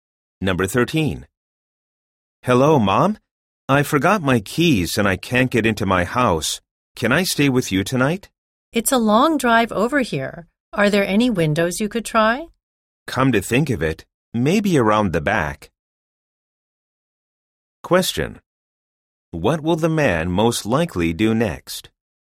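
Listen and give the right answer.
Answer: Check the windows at the back of his house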